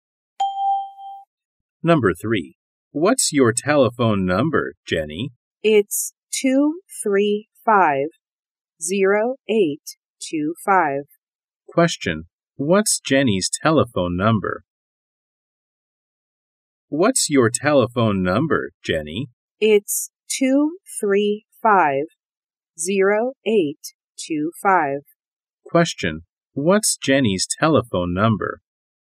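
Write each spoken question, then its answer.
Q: What's Jenny's telephone number?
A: 235-0825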